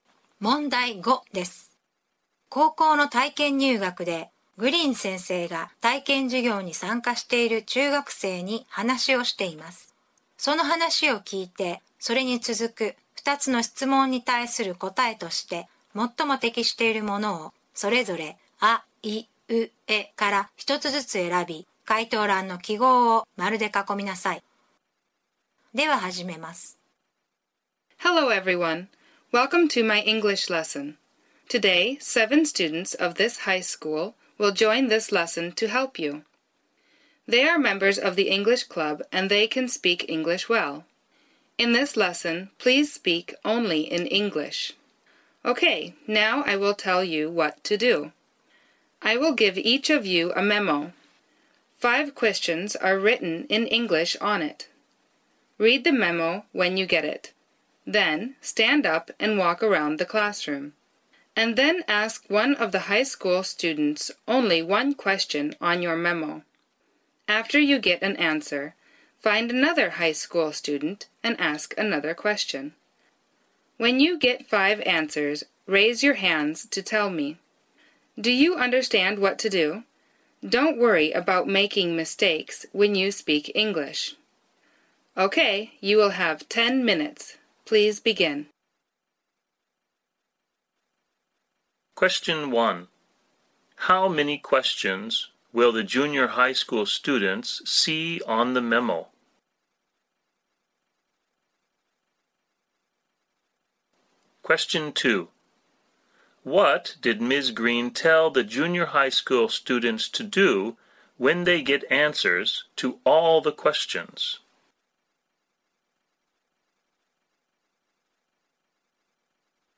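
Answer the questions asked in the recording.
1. Five questions
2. Raise their hands to tell her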